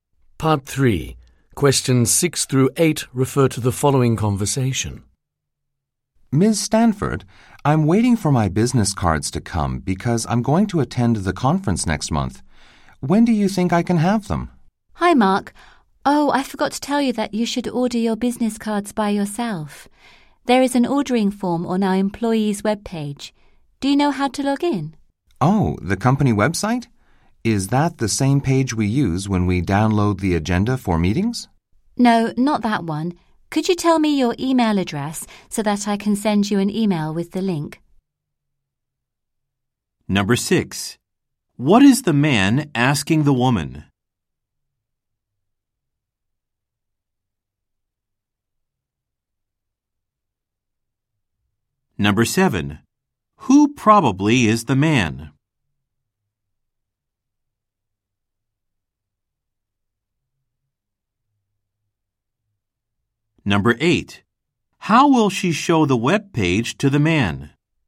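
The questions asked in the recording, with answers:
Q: What is the man asking the woman?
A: When he can have his business cards

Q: How will she show the web page to the man?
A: By sending him an email with the link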